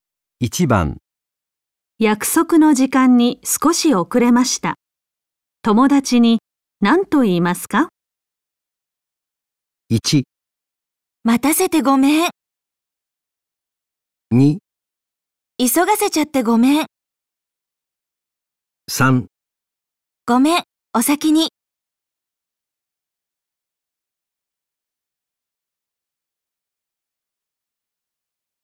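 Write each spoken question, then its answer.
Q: 約束の時間に少し遅れました。友達に何と言いますか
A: 1: 待たせてごめん。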